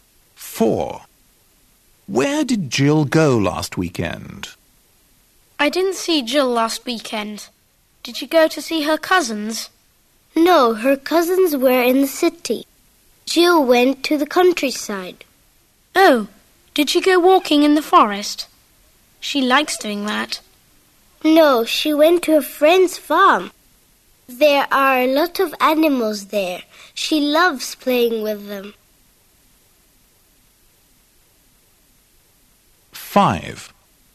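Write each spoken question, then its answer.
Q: Where did Jill go last weekend?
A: to a friend's farm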